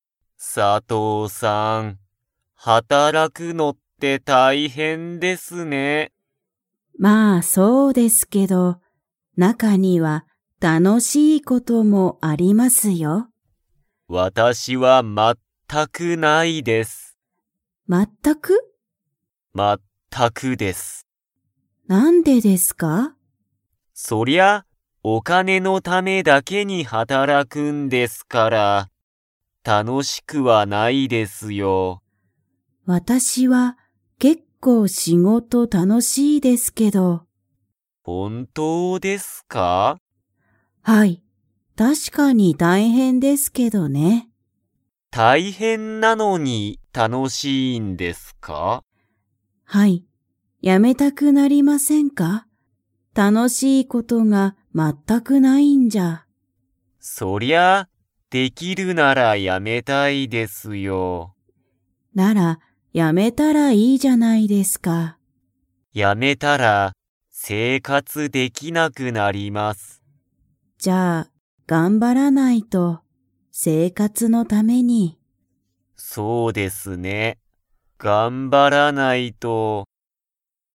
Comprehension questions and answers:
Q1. 田中(たなか)さんは、____のためだけに働(はたら)く。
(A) 時間(じかん)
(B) 問題(もんだい)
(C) 仕事(しごと)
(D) お金(かね)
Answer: お金(かね)

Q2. 佐藤(さとう)さんは、仕事(しごと)が結構(けっこう)楽たのしいですか?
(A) はい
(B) いいえ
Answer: はい

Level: Level 2

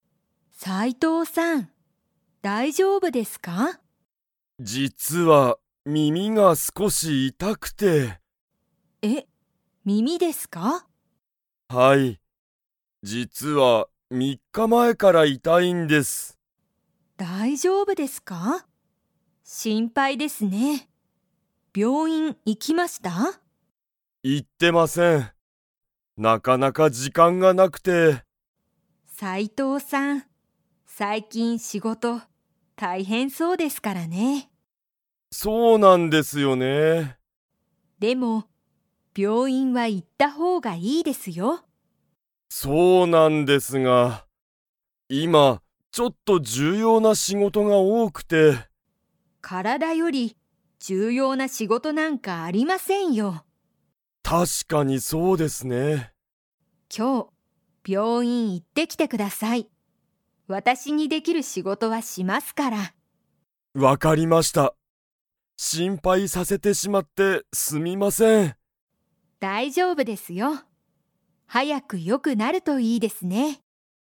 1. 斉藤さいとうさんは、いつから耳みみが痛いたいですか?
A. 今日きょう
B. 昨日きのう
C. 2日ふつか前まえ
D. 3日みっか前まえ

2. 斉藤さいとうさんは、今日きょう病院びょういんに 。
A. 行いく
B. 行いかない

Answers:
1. 3日みっか前まえ
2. 行いく

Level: Level 3

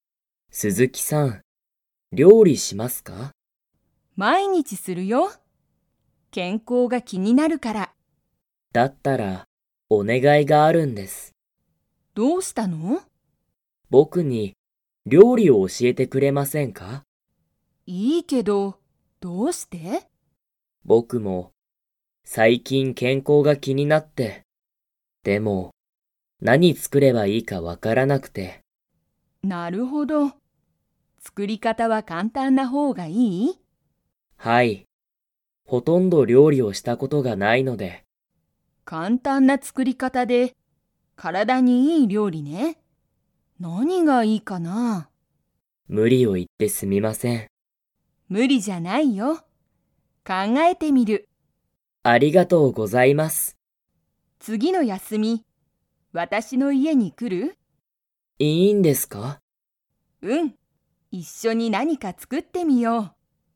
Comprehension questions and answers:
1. 鈴木すずきさんは、 料理りょうりする。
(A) 少すこし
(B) 夜よるだけ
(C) いつか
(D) 毎日まいにち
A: 毎日まいにち

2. 次つぎの休やすみ、西野にしのさんは鈴木すずきさんの家いえに行いきますか?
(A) はい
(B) いいえ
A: はい

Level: Level 3

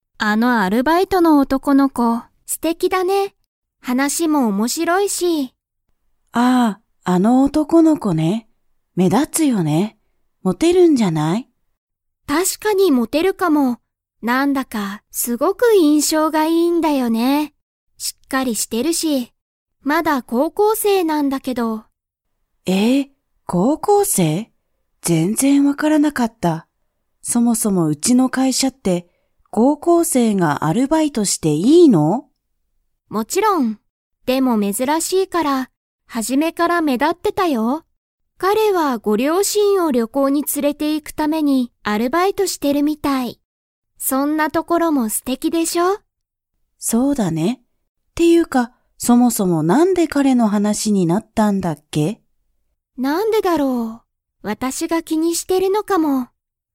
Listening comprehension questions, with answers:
Comprehension Quiz (Skip if you don't understand the conversation yet)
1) 高校生こうこうせいなのは、誰だれですか?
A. ウエノさん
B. オシダさん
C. アルバイトの男おとこの子こ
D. 男おとこの子この両親りょうしん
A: アルバイトの男おとこの子こ

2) 男おとこの子こは、両親りょうしんを旅行りょこうに 。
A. もう連つれていった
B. まだ連つれていっていない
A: まだ連つれていっていない

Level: Level 4

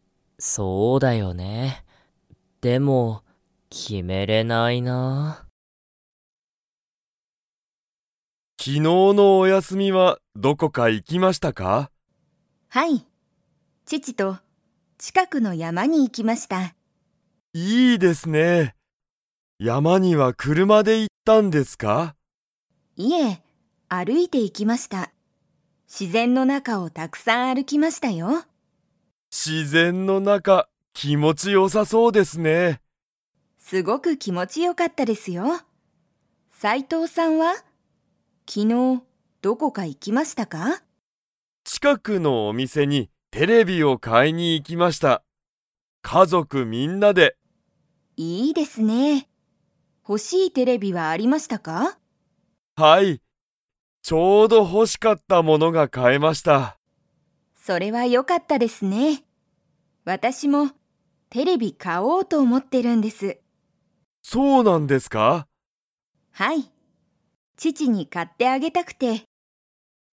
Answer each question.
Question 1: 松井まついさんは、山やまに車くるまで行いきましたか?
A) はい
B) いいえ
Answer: いいえ

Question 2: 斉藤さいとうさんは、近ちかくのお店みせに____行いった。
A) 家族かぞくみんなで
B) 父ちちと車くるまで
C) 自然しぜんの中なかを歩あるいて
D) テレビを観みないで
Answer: 家族かぞくみんなで

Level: Level 2

